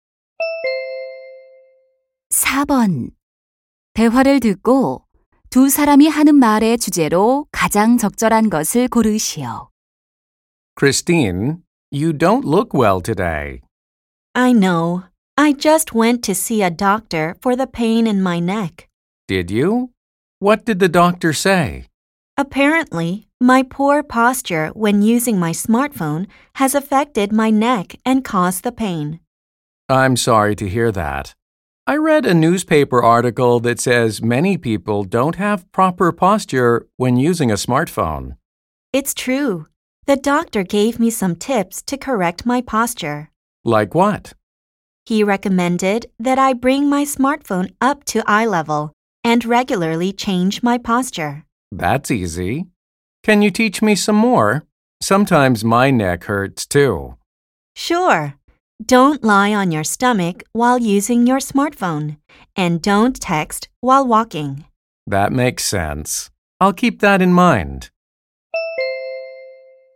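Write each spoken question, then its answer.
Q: 대화를 듣고 두 사람이 하는 말의 주제로 가장 적절한 것을 고르시오.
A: 스마트폰 사용 시 올바른 자세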